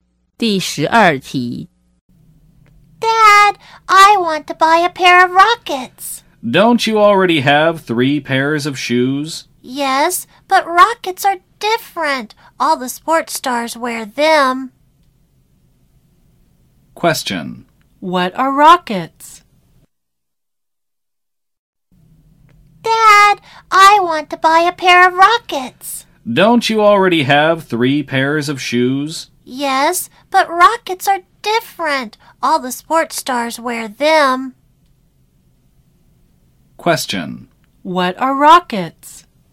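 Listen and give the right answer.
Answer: A kind of shoes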